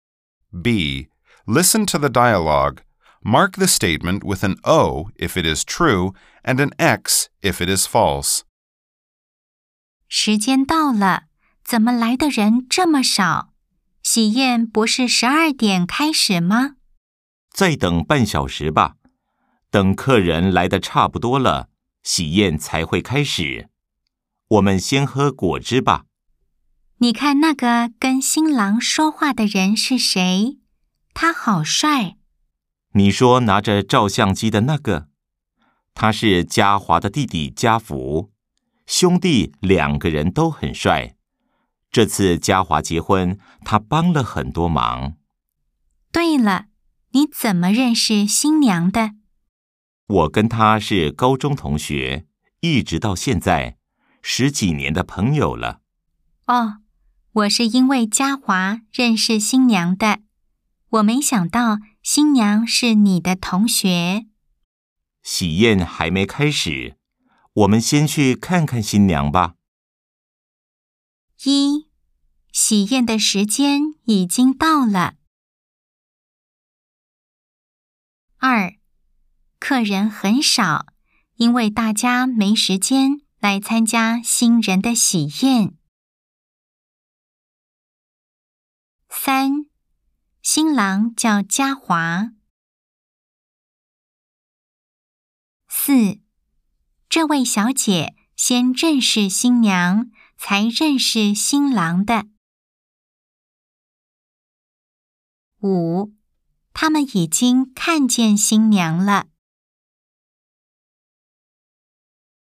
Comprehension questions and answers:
Nghe đoạn hội thoại. Đánh dấu ⭕ nếu đúng, ✖ nếu sai.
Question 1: 喜宴的時間已經到了。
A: Đúng

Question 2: 客人很少, 因為大家沒時間來參加新人的喜宴。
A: Sai

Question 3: 新郎叫家華。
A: Đúng

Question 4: 這位小姐先認識新娘, 才認識新郎的。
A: Sai

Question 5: 他們已經看見新娘了。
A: Sai

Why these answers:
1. Đúng – Cô gái nói: 🔊 "時間到了" (Đến giờ rồi).
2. Sai – Không ai nói lý do khách ít là vì bận, chỉ nói "đợi khách đến đông rồi mới bắt đầu".
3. Đúng – Nam nói: 🔊 "他是家華的弟弟", tức chú rể là Gia Hoa.
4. Sai – Cô ấy nói: 🔊 "我是因為家華認識新娘的", tức là nhờ chú rể mới quen cô dâu.
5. Sai – Cuối đoạn hội thoại, nam nói: 🔊 "我們先去看看新娘吧", tức là chưa gặp.

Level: Đương Đại 2